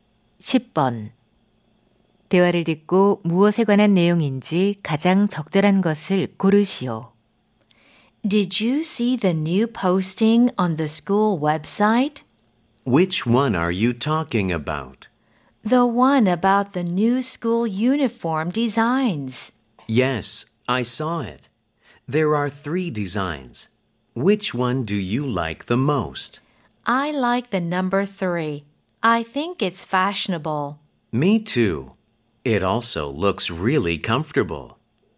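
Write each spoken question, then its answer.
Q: 대화를 듣고 무엇에 관한 내용인지 가장 적절한 것을 고르시오.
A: 새 교복 디자인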